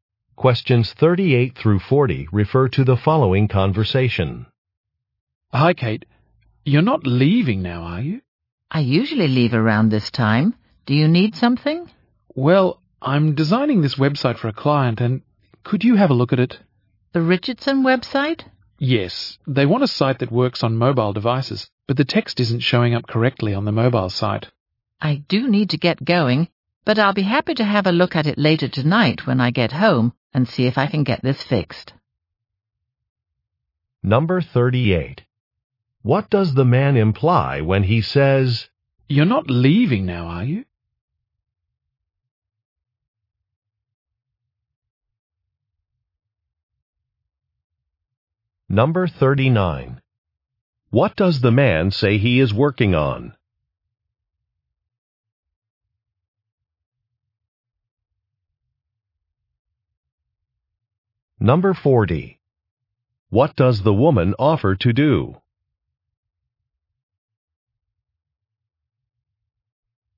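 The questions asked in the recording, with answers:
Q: What does the man say he is working on?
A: A website for a client

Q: What does the woman offer to do?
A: Look at the website later tonight at home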